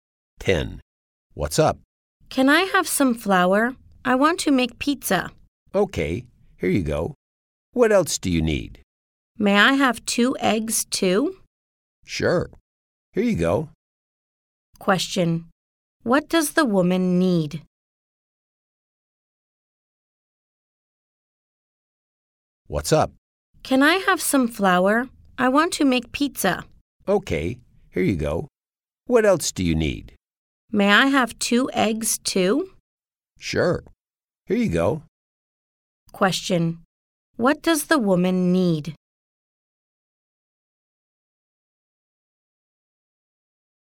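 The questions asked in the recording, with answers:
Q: Question: What does the woman need?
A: Some flour and 2 eggs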